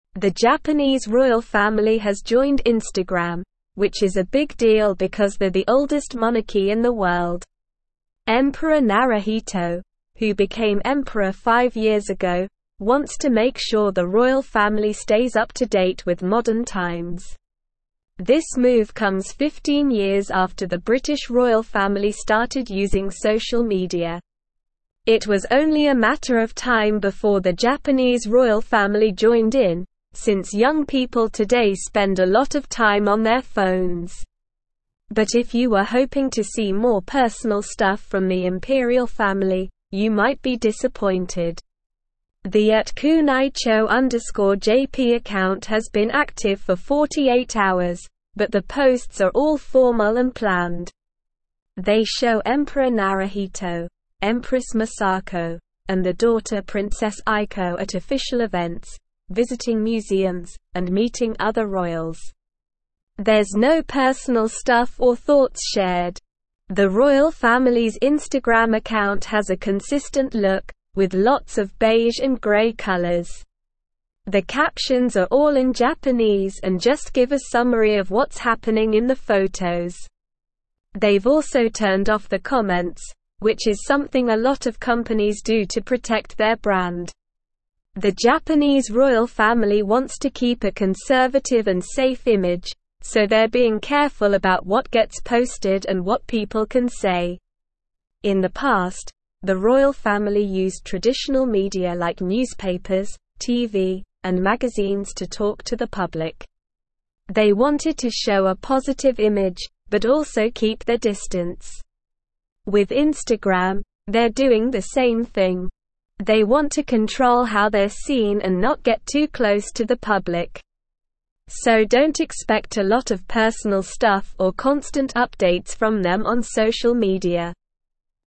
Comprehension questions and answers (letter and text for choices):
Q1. The Japanese (1)______ family has joined (2)______, which is a big deal because they're the oldest monarchy in the world.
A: royal

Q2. The Japanese (1)______ family has joined (2)______, which is a big deal because they're the oldest monarchy in the world.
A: Instagram

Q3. Emperor (3)______, who became emperor five years ago, wants to make sure the royal family (4)______ up to date with modern times.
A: Naruhito

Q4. Emperor (3)______, who became emperor five years ago, wants to make sure the royal family (4)______ up to date with modern times.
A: stays

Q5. But if you were hoping to see more (5)______ stuff from the imperial family, you might be disappointed.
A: personal

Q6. The @kunaicho_jp (6)______ has been active for 48 hours, but the (7)______ are all formal and planned.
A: account

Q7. The @kunaicho_jp (6)______ has been active for 48 hours, but the (7)______ are all formal and planned.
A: posts

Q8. They show Emperor Naruhito, Empress Masako, and their daughter Princess Aiko at official (8)______, visiting museums, and meeting other royals.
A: events

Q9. The royal (9)______'s Instagram account has a consistent look, with lots of (10)______ and grey colors.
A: family

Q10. The royal (9)______'s Instagram account has a consistent look, with lots of (10)______ and grey colors.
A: beige

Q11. The captions are all in (11)______ and just give a summary of what's happening in the photos.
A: Japanese

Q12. The Japanese royal family wants to keep a conservative and safe (12)______, so they're being careful about what gets posted and what people can say.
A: image

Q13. In the past, the royal family used traditional (13)______ like newspapers, TV, and (14)______ to talk to the (15)______.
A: media

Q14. In the past, the royal family used traditional (13)______ like newspapers, TV, and (14)______ to talk to the (15)______.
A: magazines

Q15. In the past, the royal family used traditional (13)______ like newspapers, TV, and (14)______ to talk to the (15)______.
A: public

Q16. They want to (16)______ how they're seen and not get too close to the public.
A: control

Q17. Why is the Japanese royal family joining Instagram a big deal?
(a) They want to share personal stuff with the public.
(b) They want to compete with the British royal family.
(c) They want to become more modern.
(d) They are the oldest monarchy in the world.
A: (d) They are the oldest monarchy in the world.

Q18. How long has the @kunaicho_jp Instagram account been active?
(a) 5 years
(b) 48 hours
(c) 15 years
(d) 10 years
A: (b) 48 hours

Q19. What kind of posts can you expect to see on the royal family's Instagram account?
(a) Formal and planned posts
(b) Personal stuff and thoughts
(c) Funny and entertaining posts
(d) Random and spontaneous posts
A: (a) Formal and planned posts

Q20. What do the captions on the royal family's Instagram account provide?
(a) A summary of what's happening in the photos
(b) Personal anecdotes and stories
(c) Jokes and funny comments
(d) Quotes from famous people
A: (a) A summary of what's happening in the photos

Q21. Why have the comments been turned off on the royal family's Instagram account?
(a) To encourage more engagement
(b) To protect their brand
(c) To avoid negative comments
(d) To show a more personal side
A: (b) To protect their brand

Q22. What is the royal family's goal with their Instagram account?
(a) To share personal thoughts and experiences with the public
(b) To become closer to the public and share constant updates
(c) To control how they are seen and maintain a conservative image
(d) To compete with other royal families on social media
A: (c) To control how they are seen and maintain a conservative image

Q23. What can you expect in terms of personal updates from the royal family on social media?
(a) Daily updates and personal stories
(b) Personal photos and behind-the-scenes moments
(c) Not a lot of personal stuff or constant updates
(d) Personal thoughts and opinions on current events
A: (c) Not a lot of personal stuff or constant updates

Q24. The Instagram account has an inconsistent look with various colors, and the captions are all in English, providing detailed descriptions of the photos.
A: False

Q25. The Japanese royal family wants to maintain a conservative and safe image, so they are cautious about what they post and what people can say.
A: True

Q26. The @kunaicho_jp Instagram account has been active for 48 hours, but the posts are all spontaneous and candid, showing the royal family at informal events and interacting with the public.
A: False

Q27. In the past, the royal family used traditional media to communicate with the public, and now they are doing the same with Instagram, aiming to control how they are perceived and maintain a certain distance from the public.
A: True

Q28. The British royal family stopped using social media 15 years ago, so it was only a matter of time before the Japanese royal family stood out.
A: False

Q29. The Japanese royal family has recently quit Instagram, making them the youngest monarchy in the world to do so.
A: False

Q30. The comments on the royal family's Instagram account have been turned off to protect their brand, which is a common practice for many companies.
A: True

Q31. Emperor Naruhito, who has been emperor for five years, wants to ensure that the royal family keeps up with the modern times.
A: True

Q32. Why is it a big deal that the Japanese royal family has joined Instagram?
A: It's a big deal because they're the oldest monarchy in the world and they're known for being traditional. So, for them to join a social media platform like Instagram is a big change.

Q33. How long has Emperor Naruhito been the emperor?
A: Emperor Naruhito has been the emperor for five years.

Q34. Why did the Japanese royal family join Instagram?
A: They joined Instagram to stay up to date with modern times and to connect with young people who spend a lot of time on their phones.

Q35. Are the posts on the royal family's Instagram account personal or formal?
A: The posts on the royal family's Instagram account are formal.

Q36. What do the captions on the Instagram posts contain?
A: The captions on the Instagram posts contain a summary of what's happening in the photos.

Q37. Why did the royal family turn off the comments on their Instagram posts?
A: The royal family turned off the comments on their Instagram posts to protect their brand and to control how they're seen by the public.

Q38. What is the royal family's goal with using Instagram?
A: The royal family's goal with using Instagram is to show a positive image, but also keep their distance from the public. They want to control how they're seen and not get too close to the public.

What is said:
The Japanese royal family has joined Instagram, which is a big deal because they're the oldest monarchy in the world. Emperor Naruhito, who became emperor five years ago, wants to make sure the royal family stays up to date with modern times. This move comes 15 years after the British royal family started using social media. It was only a matter of time before the Japanese royal family joined in, since young people today spend a lot of time on their phones.
But if you were hoping to see more personal stuff from the imperial family, you might be disappointed. The @kunaicho_jp account has been active for 48 hours, but the posts are all formal and planned. They show Emperor Naruhito, Empress Masako, and their daughter Princess Aiko at official events, visiting museums, and meeting other royals. There's no personal stuff or thoughts shared.
The royal family's Instagram account has a consistent look, with lots of beige and grey colors. The captions are all in Japanese and just give a summary of what's happening in the photos. They've also turned off the comments, which is something a lot of companies do to protect their brand. The Japanese royal family wants to keep a conservative and safe image, so they're being careful about what gets posted and what people can say.
In the past, the royal family used traditional media like newspapers, TV, and magazines to talk to the public. They wanted to show a positive image, but also keep their distance. With Instagram, they're doing the same thing. They want to control how they're seen and not get too close to the public. So don't expect a lot of personal stuff or constant updates from them on social media.

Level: Level 3